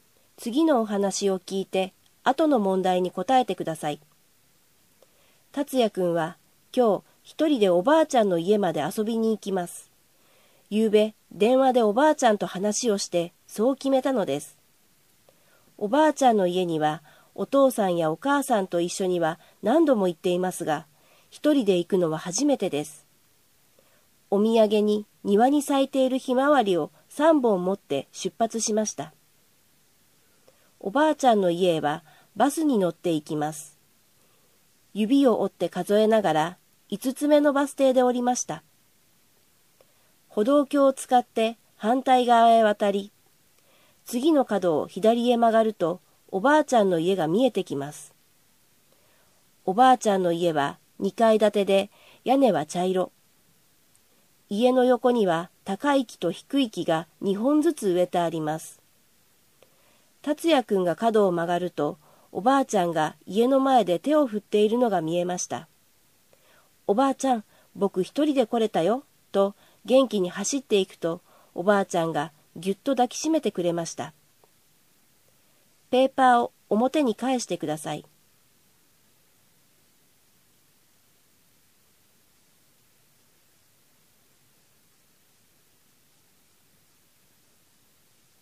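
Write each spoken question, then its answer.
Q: 達也くんはお土産にひまわりを何本持っていきましたか?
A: 3本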